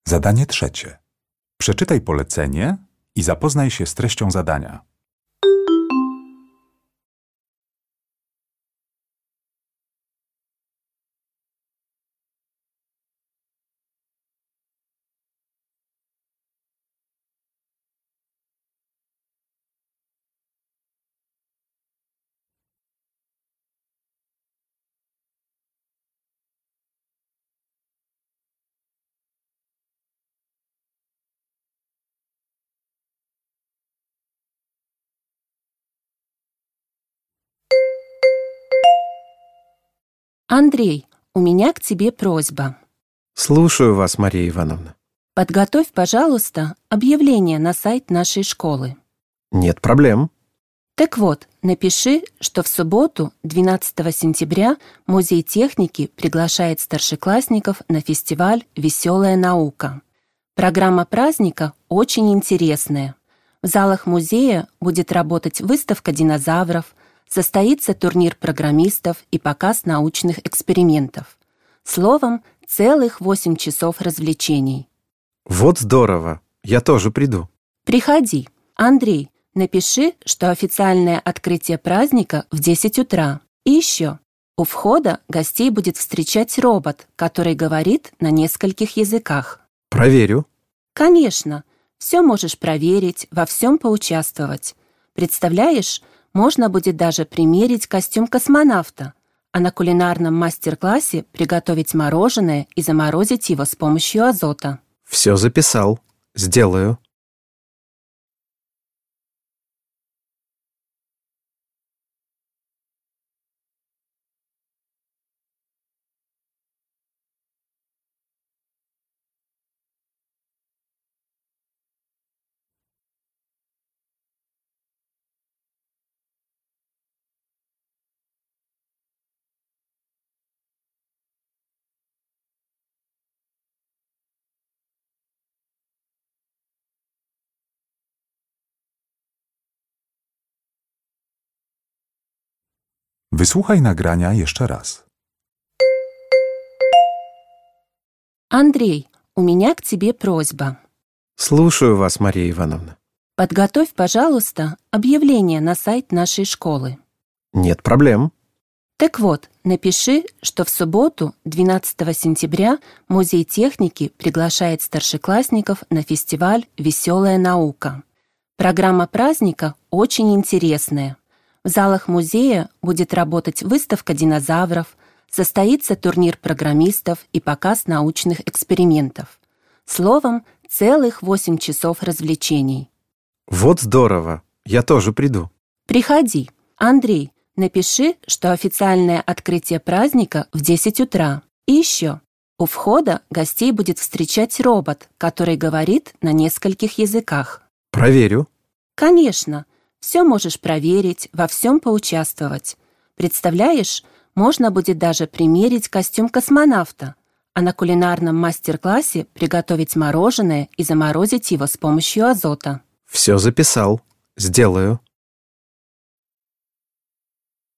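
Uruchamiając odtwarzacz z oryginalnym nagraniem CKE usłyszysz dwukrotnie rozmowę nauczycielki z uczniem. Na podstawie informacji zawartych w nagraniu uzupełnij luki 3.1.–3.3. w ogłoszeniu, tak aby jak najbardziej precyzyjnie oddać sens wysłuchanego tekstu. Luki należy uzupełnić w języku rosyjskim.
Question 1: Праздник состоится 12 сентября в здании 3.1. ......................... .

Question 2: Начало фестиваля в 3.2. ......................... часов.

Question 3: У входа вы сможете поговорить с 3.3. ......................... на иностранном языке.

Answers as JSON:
{"1": "музея", "2": "десять", "3": "роботом"}

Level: egzamin ósmoklasisty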